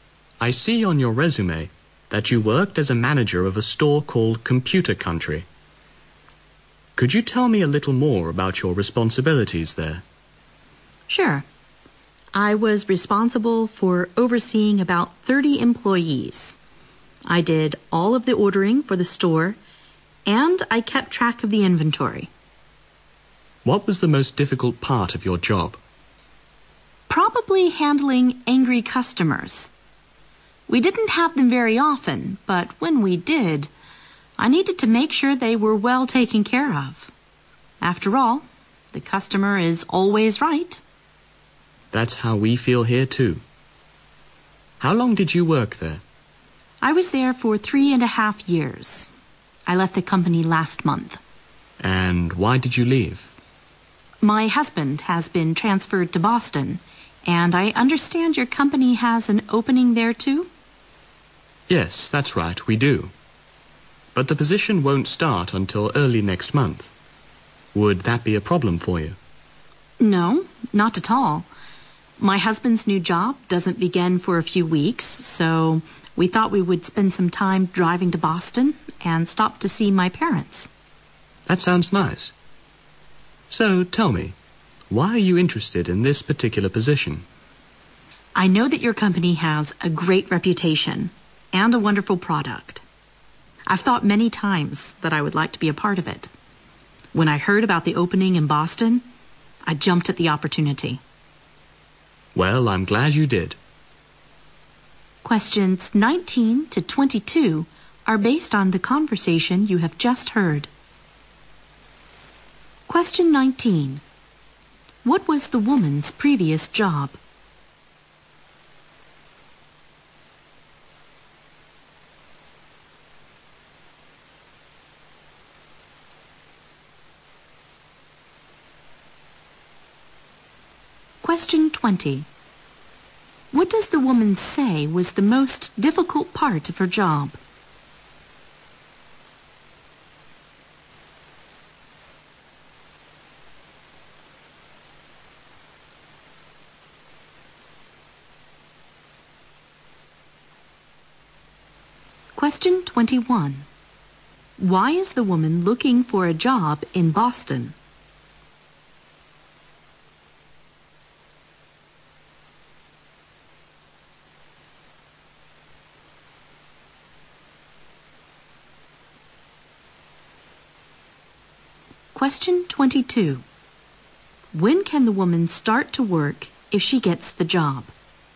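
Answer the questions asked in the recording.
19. Manager of a store called Computer Country
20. Handling angry customers
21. Her husband has been transferred to Boston.
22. Early next month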